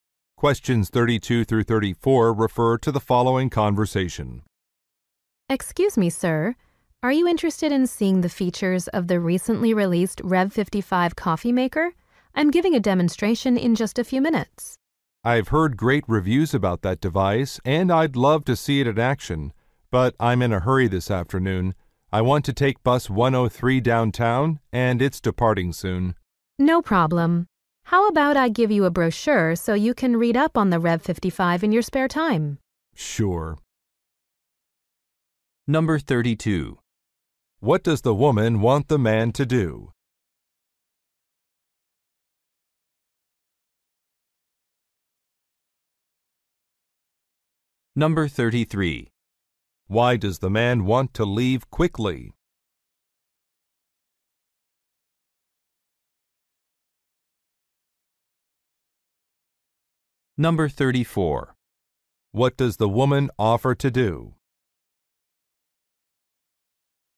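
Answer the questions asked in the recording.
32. Watch a demonstration of the Rev55 coffee maker
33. He needs to catch bus 103 downtown, which leaves soon
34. Give him a brochure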